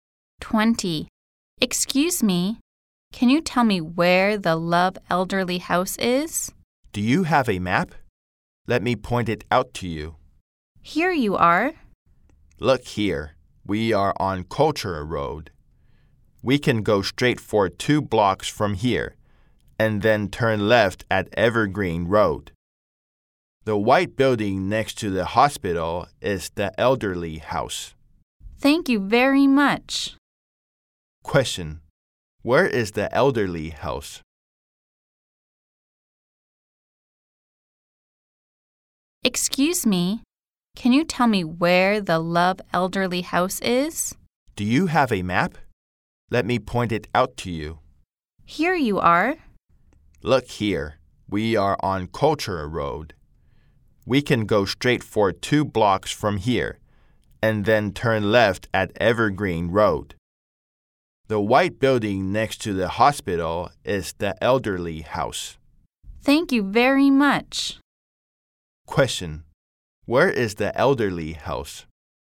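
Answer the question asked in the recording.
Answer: The white building next to the hospital on Evergreen Road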